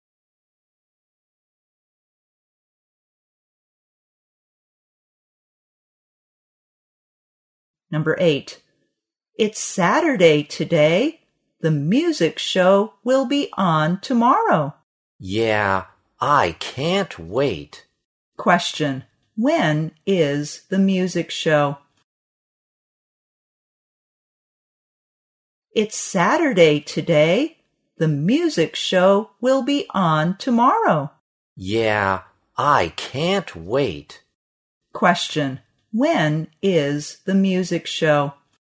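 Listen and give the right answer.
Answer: On Sunday.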